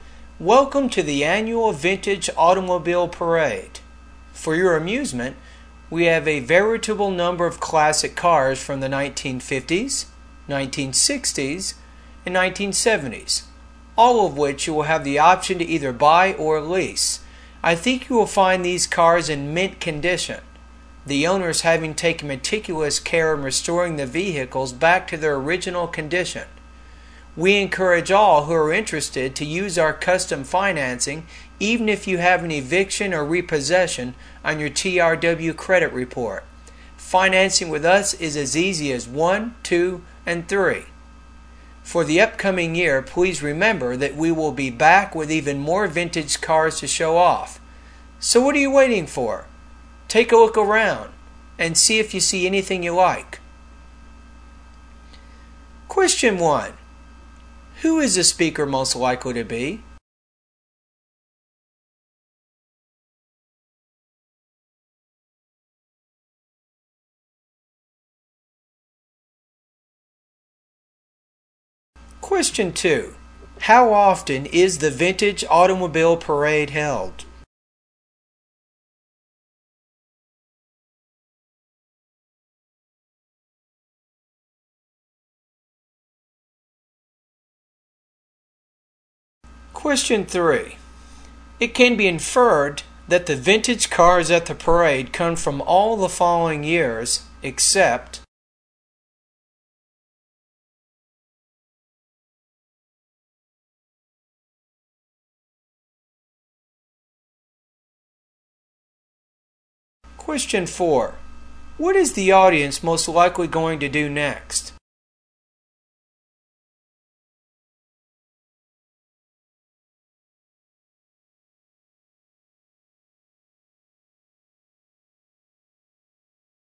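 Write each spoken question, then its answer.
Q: How often is the Vintage Automobile Parade held?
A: Once a year (annually)

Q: What is the audience most likely going to do next?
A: Look around at the cars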